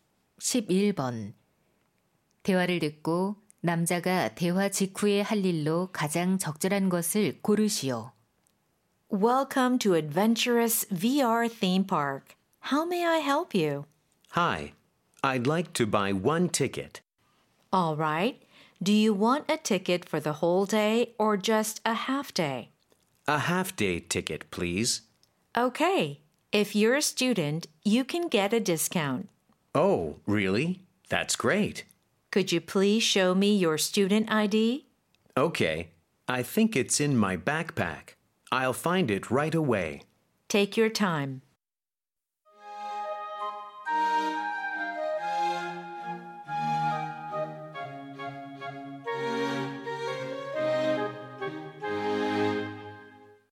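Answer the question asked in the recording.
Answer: 가방에서 학생증 찾기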